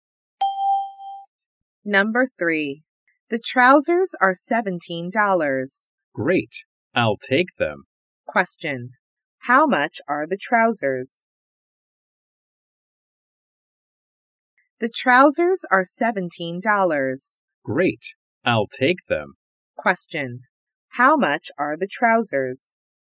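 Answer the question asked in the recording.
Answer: $17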